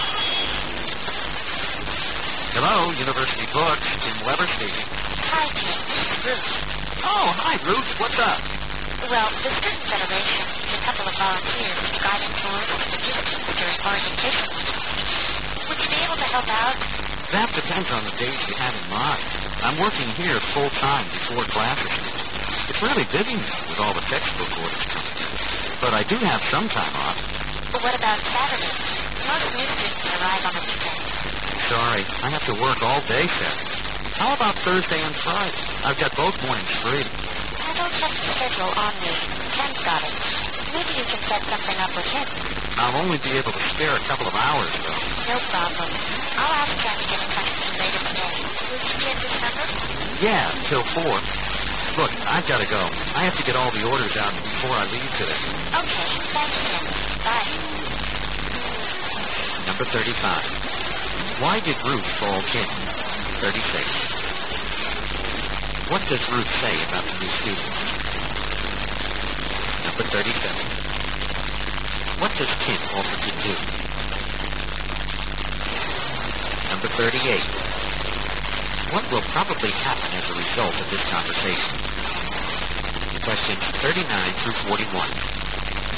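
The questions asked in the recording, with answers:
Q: What does Ruth say about the new student?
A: Most new students arrive on the weekend

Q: What does Kim offer to do?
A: Help out on Thursday and Friday mornings

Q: What will probably happen as a result of this conversation?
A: Ken will get in touch with Jim later that day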